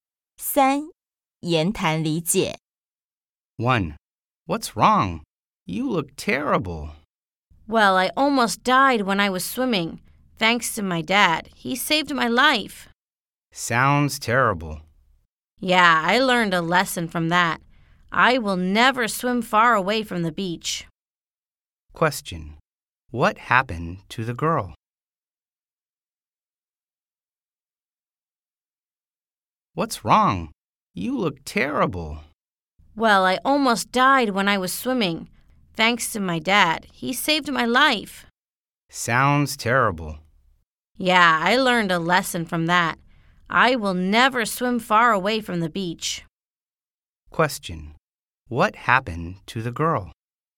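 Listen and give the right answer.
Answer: She almost died while swimming, and her dad saved her life.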